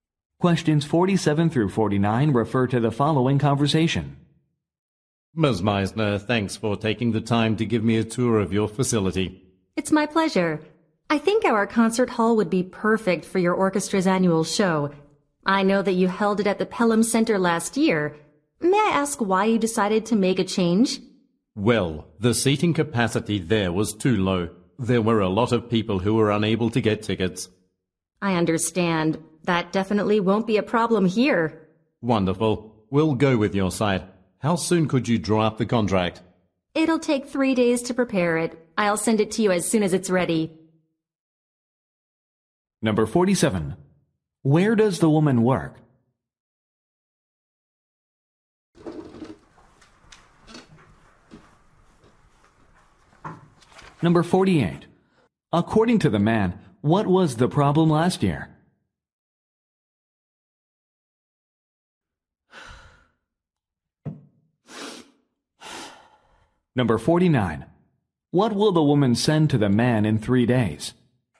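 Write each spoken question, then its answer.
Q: Where does the woman work?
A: At a concert hall

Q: According to the man, what was the problem last year?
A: The seating capacity was too low

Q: What will the woman send to the man in 3 days?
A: A contract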